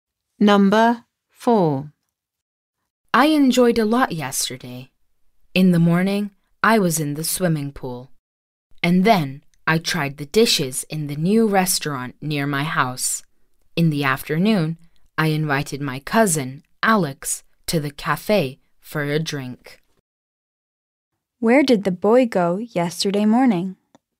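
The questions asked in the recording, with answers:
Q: Where did the boy go yesterday morning?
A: To the swimming pool.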